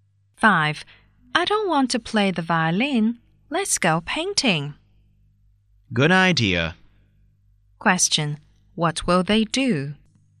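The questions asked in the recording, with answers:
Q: What will they do?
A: Go painting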